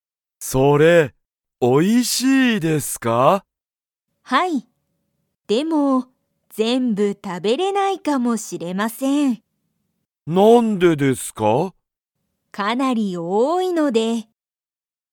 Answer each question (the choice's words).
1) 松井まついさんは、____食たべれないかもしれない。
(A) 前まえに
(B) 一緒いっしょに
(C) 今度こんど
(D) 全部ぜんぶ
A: 全部ぜんぶ

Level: Level 1